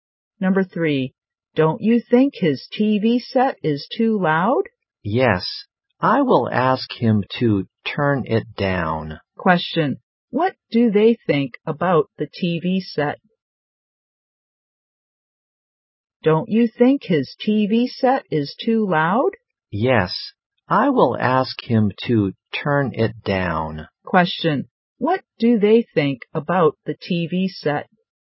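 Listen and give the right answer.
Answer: It is too loud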